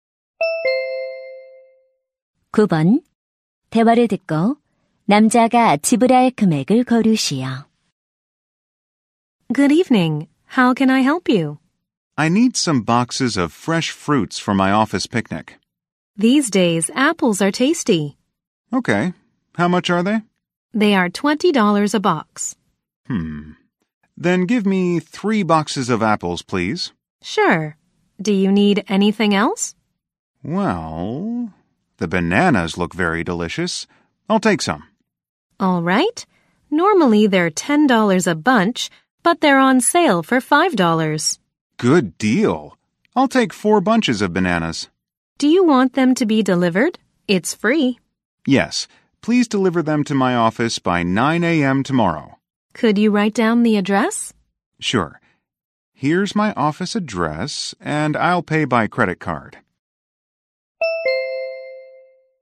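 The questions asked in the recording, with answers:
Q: 대화를 듣고 남자가 지불할 금액을 고르시오.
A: $80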